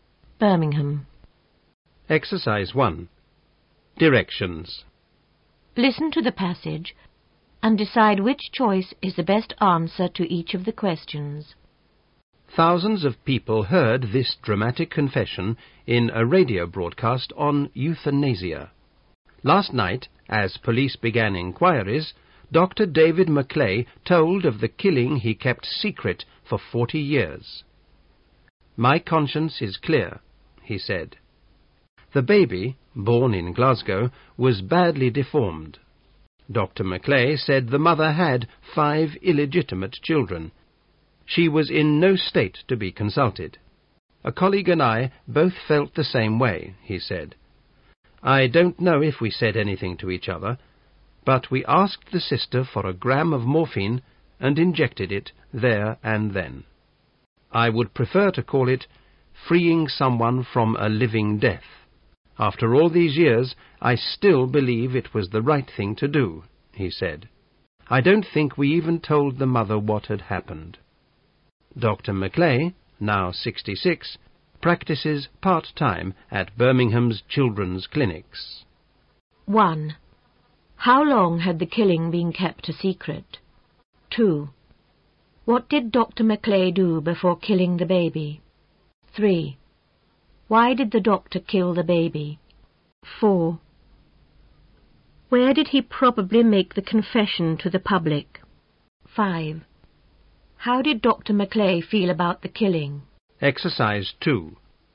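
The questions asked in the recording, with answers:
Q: How long had the killing been kept a secret?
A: 40 years

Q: Why did the doctor kill the baby?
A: The baby was badly deformed

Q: Where did he probably make the confession to the public?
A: In a radio broadcast

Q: How did Dr. McClay feel about the killing?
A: His conscience was clear; he thought it was right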